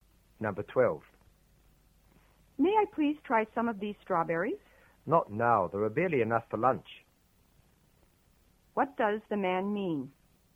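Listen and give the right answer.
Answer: She can't have any now; there are barely enough strawberries for lunch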